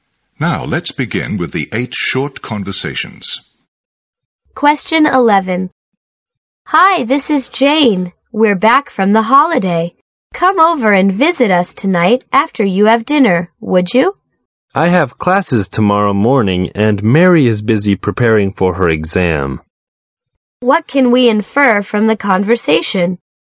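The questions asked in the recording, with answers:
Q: What can we infer from the conversation?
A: They can't visit Jane tonight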